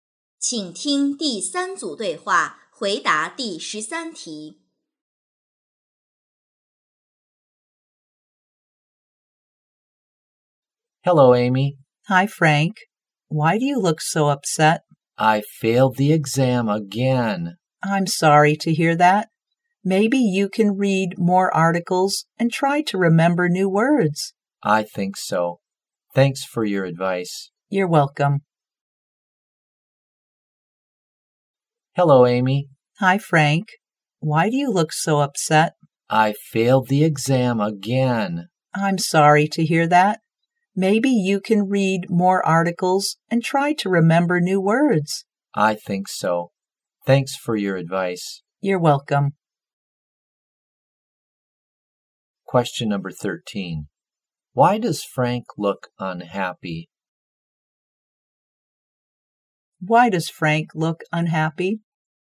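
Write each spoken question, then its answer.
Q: Why does Frank look unhappy?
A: He failed the exam again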